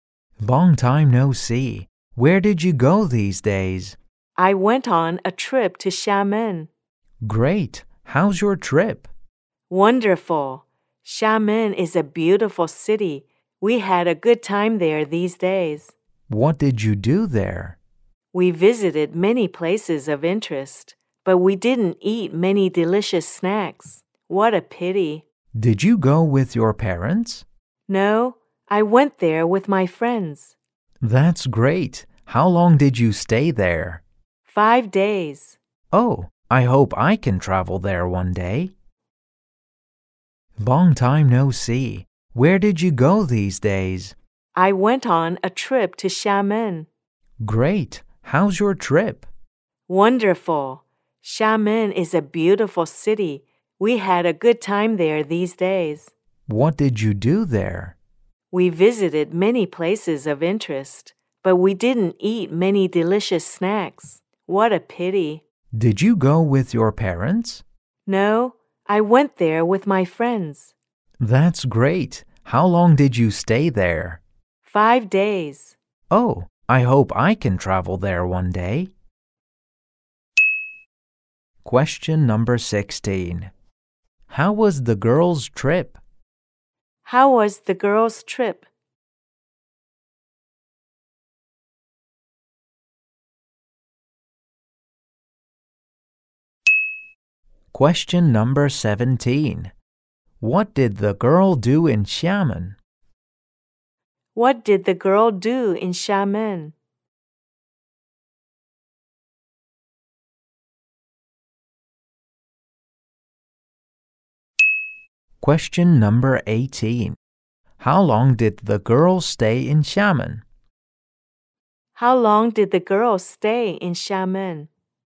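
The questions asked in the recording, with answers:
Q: How was the girl's trip?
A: Wonderful.

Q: What did the girl do in Xiamen?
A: She visited many places of interest.

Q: How long did the girl stay in Xiamen?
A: 5 days.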